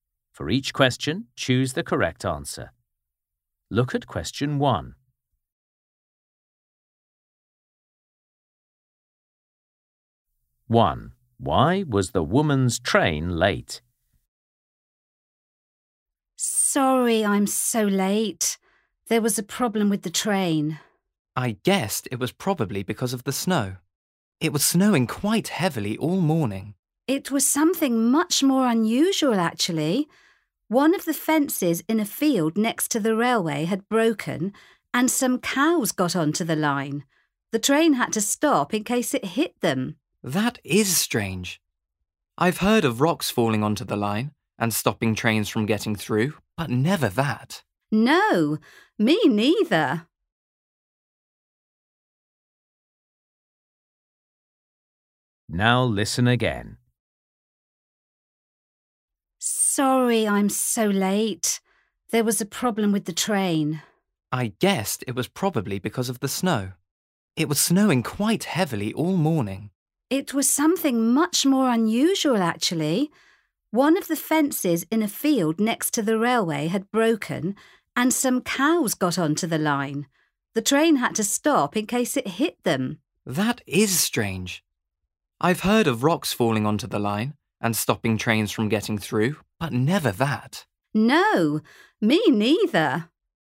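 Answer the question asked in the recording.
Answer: Cows got onto the line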